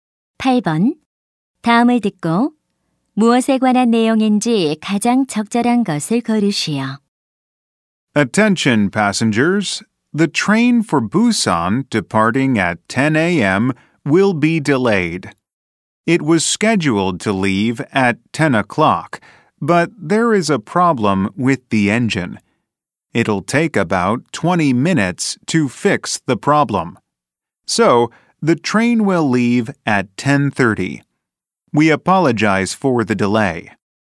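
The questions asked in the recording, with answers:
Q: 다음을 듣고 무엇에 관한 내용인지 가장 적절한 것을 고르시오.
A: 기차 출발 지연 안내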